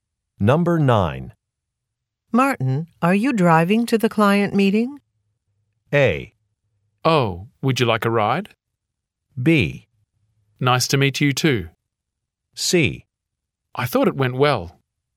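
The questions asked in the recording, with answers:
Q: Martin, are you driving to the client meeting?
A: A: Oh, would you like a ride?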